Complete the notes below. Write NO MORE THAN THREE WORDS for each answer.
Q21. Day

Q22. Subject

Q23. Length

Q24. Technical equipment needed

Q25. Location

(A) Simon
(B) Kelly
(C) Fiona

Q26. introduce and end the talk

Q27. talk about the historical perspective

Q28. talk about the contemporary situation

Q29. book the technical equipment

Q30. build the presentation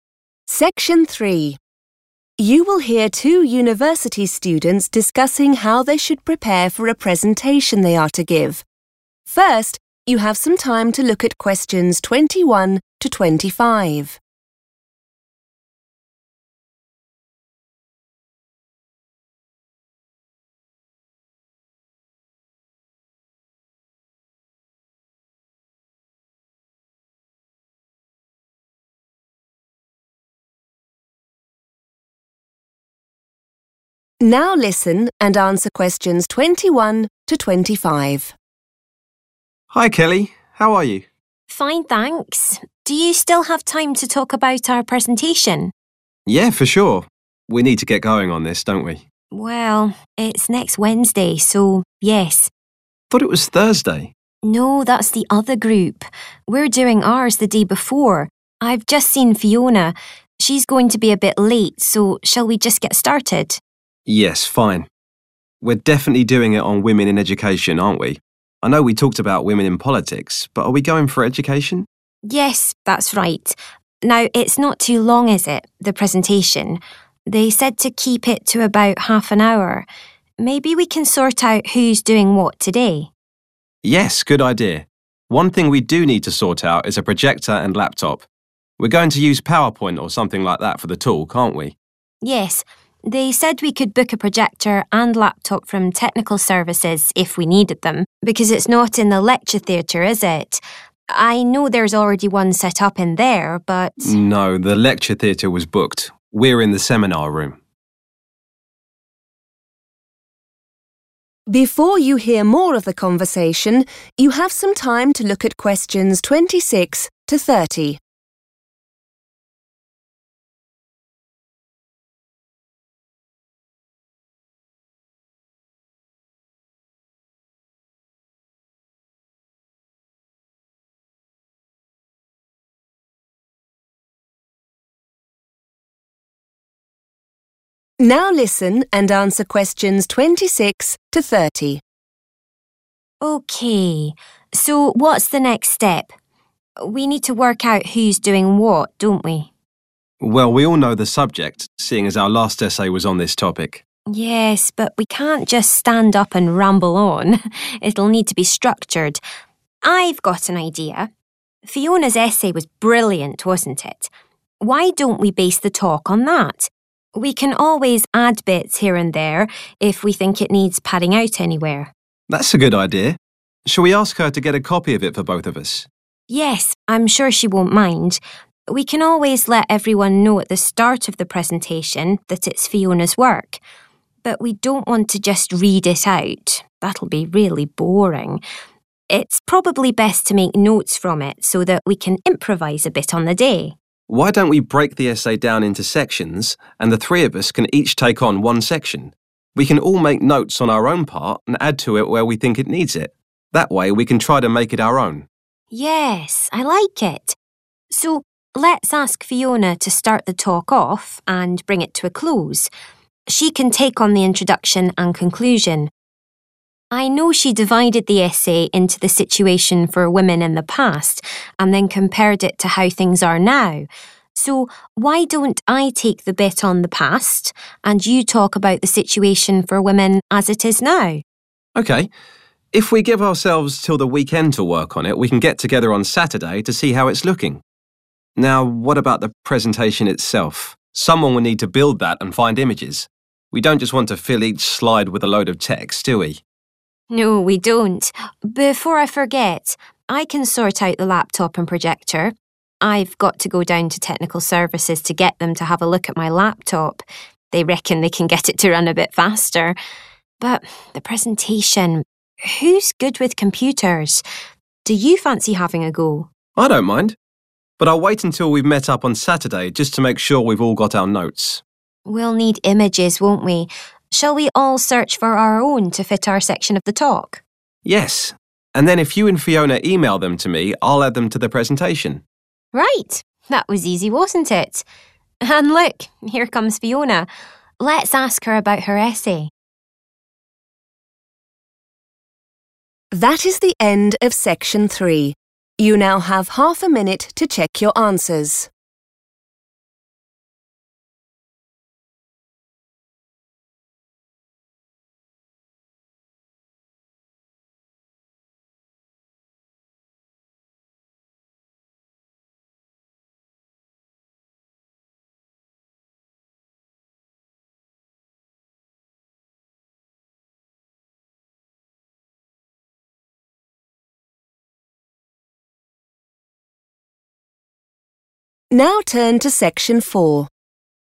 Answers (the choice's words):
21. Wednesday
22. women in education
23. half an hour
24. projector and laptop / computer
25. the seminar room / seminar room
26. Fiona
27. Kelly
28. Simon
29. Kelly
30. Simon

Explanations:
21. The transcript shows Kelly confirming to Simon that their presentation is planned for next Wednesday. Answer Explanation: The answer "Wednesday" refers to the day of the week when the group will give their presentation. Reason For Correctness: The correct answer is Wednesday because Kelly tells Simon that is when their presentation is happening. While Simon mistakenly thinks it is on Thursday, Kelly explains that Thursday belongs to a different group and that their own talk is scheduled for the day before.
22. The transcript shows Simon asking Kelly to make sure they are presenting on the topic of women in education. Kelly agrees and confirms that he is correct. Answer Explanation: The answer is the specific topic or subject matter that Simon, Kelly, and Fiona will talk about in their presentation. Reason For Correctness: The correct answer is women in education because Simon asks Kelly to confirm that this is the topic they chose. He mentions that they had previously considered talking about women in politics, but then asks if they are instead going for Education, to which Kelly says, 'Yes, that's right.'
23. The transcript shows that the students were told to make their presentation last for roughly 30 minutes. Answer Explanation: The answer means that the presentation should be 30 minutes long. Reason For Correctness: The correct answer is based on the part of the conversation where Kelly discusses the timing of the talk. She explains that they were instructed to limit the length of their presentation to approximately 30 minutes. Keywords to note are 'keep it to', which means the limit or duration allowed.
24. The transcript shows that Simon identifies these two pieces of technology as things they must get for their school work. Answer Explanation: The answer lists the items of technology, like a portable computer and a special light machine for showing pictures on a screen, that the group wants to use. Reason For Correctness: The correct answer is 'projector and laptop' because Simon says they must 'sort out' or prepare these two specific machines so they can use PowerPoint. Kelly also mentions they can get them from technical services.
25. The transcript shows Simon telling Kelly that the lecture theatre was not available. Instead, he says they are "in the seminar room," which tells the listener exactly where they will be. Answer Explanation: The answer is "(the) seminar room". This is the room where Simon, Kelly, and Fiona will give their presentation. Reason For Correctness: The correct answer is "(the) seminar room" because Simon clarifies that they cannot use the lecture theatre. In the conversation, he explains that the lecture theatre was already reserved or "booked," so their presentation location is the seminar room. A location is the specific place where an event happens.
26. The transcript shows Kelly suggesting that Fiona should be the person to begin their talk ('start the talk off') and finish it ('bring it to a close') by handling the introduction and the end. Answer Explanation: The answer C refers to the student named Fiona. Reason For Correctness: The correct answer is C because the students decide that Fiona will be the one to start their presentation and finish it. In a presentation, starting is called an 'introduction' and finishing is called a 'conclusion.' Since Fiona is doing both, she is responsible for starting and ending the talk.
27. The transcript shows Kelly offering to handle the section of the talk that focuses on the past, which is what 'historical perspective' means. Answer Explanation: The answer is Kelly because she is the person who will talk about what happened to women in education in the past. Reason For Correctness: The correct answer is B (Kelly). In the conversation, the group decides how to divide their presentation into different sections. Kelly suggests that she should talk about 'the past.' The word 'past' serves as a synonym for 'historical perspective,' which refers to looking at how things were in the time before now.
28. The transcript shows Kelly suggesting a plan where she talks about history and Simon (the person she is talking to) talks about the present situation. Simon agrees to this plan. Answer Explanation: The answer is Simon (A). Simon is the person who will give a talk about how women are doing in the world today. Reason For Correctness: The correct answer is Simon because Kelly asks him to handle the part of the presentation that covers the current situation for women. In the dialogue, Kelly says she will talk about women in the past and suggests that Simon talks about how things are "now." Simon agrees by saying "Okay." The word "contemporary" in the question is a synonym for "now" or "the current situation."
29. The transcript shows Kelly saying she will 'sort out' (organize/arrange) the technical tools because she is already going to the technical office to get her own computer fixed. Answer Explanation: The answer is Kelly (B) because she tells Simon that she will take care of getting the equipment needed for their presentation. Reason For Correctness: The correct answer is B because Kelly uses the phrase 'sort out the laptop and projector,' which indicates she will be the person responsible for organizing and securing the technical equipment they need. She explains that she is already planning to visit 'technical services' (the place that provides the equipment) for her own laptop, making it convenient for her to handle this task.
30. The transcript shows Kelly asking Simon if he wants to be the person to handle the presentation since he is good with computers. Simon replies that he is fine with doing that task after they have all their information ready. Answer Explanation: The answer is Simon because he is the person who will create the slides for the group talk. Reason For Correctness: The correct answer is Simon because Kelly asks him if he wants to try making the presentation on the computer. Simon says, "I don't mind," which means he is willing to do it. He later tells Kelly and Fiona to email him pictures so he can "add them to the presentation," confirming he is the one building the final product.

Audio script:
Simon: Hi Kelly. How are you?
Kelly: Fine thanks. Do you still have time to talk about our presentation?
Simon: Yeah, for sure. We need to get going on this, don't we?
Kelly: Well, it's next Wednesday, so yes.
Simon: I thought it was Thursday.
Kelly: No that's the other group. We're doing ours the day before. I've just seen Fiona. She's going to be a bit late so shall we just get started?
Simon: Yes, fine. We're definitely doing it on women in education, aren't we? I know we talked about women in politics but are we going for education?
Kelly: Yes, that's right. Now it's not too long is it, the presentation? They said to keep it to about half an hour. Maybe we can sort out who's doing what today.
Simon: Yes, good idea. One thing we do need to sort out is a projector and laptop. We're going to use PowerPoint or something like that for the talk, aren't we?
Kelly: Yes. They said we could book a projector and laptop from technical services if we needed them. Because it's not in the lecture theatre, is it? I know there's already one set up in there but ...
Simon: No, the lecture theatre was booked. We're in the seminar room.
So what's the next step? We need to work out who's doing what, don't we?
Simon: Well, we all know the subject, seeing as our last essay was on this topic.
Kelly: Yes, but we can't just stand up and ramble on; it'll need to be structured. I've got an idea. Fiona's essay was brilliant, wasn't it? Why don't we base the talk on that? We can always add bits here and there if we think it needs padding out anywhere.
Simon: That's a good idea. Shall we ask her to get a copy of it for both of us?
Kelly: Yes, I'm sure she won't mind. We can always let everyone know at the start of the presentation that it's Fiona's work. But we don't want to just read it out. That'll be really boring. It's probably best to make notes from it so that we can improvise a bit on the day.
Simon: Why don't we break the essay down into sections and the three of us can each take on one section. We can all make notes on our own part and add to it where we think it needs it. That way we can try to make it our own.
Kelly: Yes, I like it. So let's ask Fiona to start the talk off and bring it to a close. She can take on the introduction and conclusion. I know she divided the essay into the situation for woman in the past and then compared it to how things are now. So why don't I take the bit on the past and you talk about the situation for women as it is now?
If we give ourselves till the weekend to work on it we can get together on Saturday to see how it's looking. Now what about the presentation itself? Someone will need to build that and find images. We don't just want to fill each slide with a load of text, do we?
Kelly: No we don't. Before I forget, I can sort out the laptop and projector. I've got to go down to technical services to get them to have a look at my laptop. They reckon they can get it to run a bit faster. But the presentation ... who's good with computers? Do you fancy having a go?
Simon: I don't mind. But I'll wait until we've met up on Saturday just to make sure we've all got our notes.
Kelly: We'll need images, won't we? Shall we all search for our own to fit our section of the talk?
Simon: Yes, and then if you and Fiona email them to me I'll add them to the presentation.
Kelly: Right, that was easy wasn't it? And look, here comes Fiona. Let's ask her about her essay.